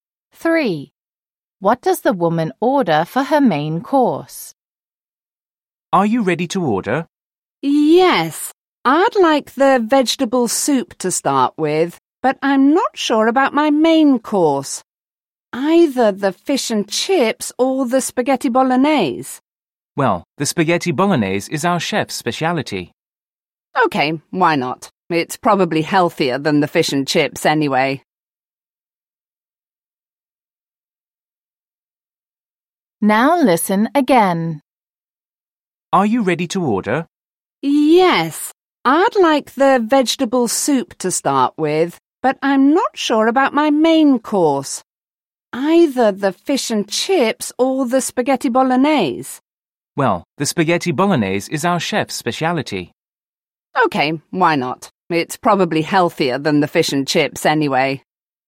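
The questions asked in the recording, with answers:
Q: What does the woman order for her main course?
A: Spaghetti bolognese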